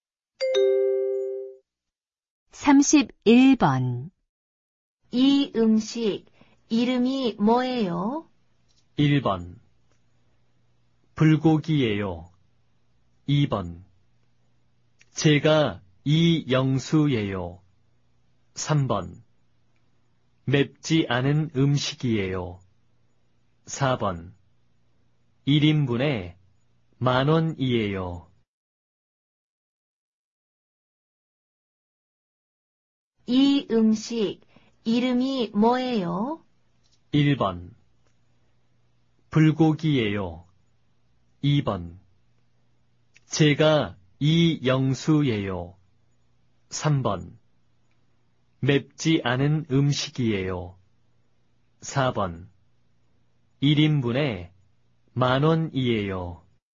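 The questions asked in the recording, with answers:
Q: 이 음식 이름이 뭐예요?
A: 1: 불고기예요.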